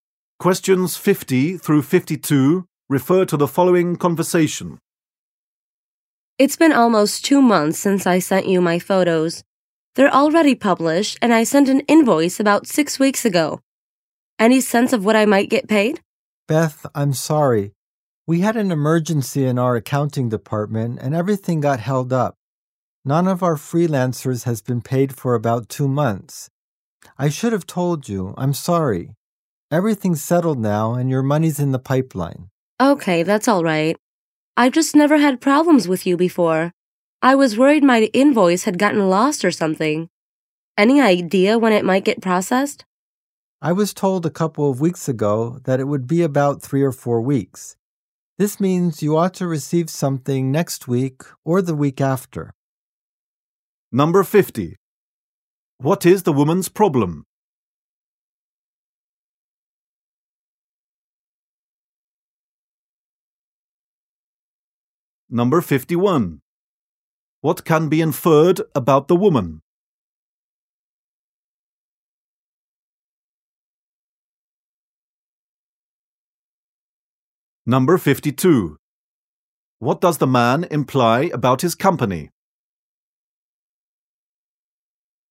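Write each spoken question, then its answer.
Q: What is the woman's problem?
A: She hasn't been paid for her photos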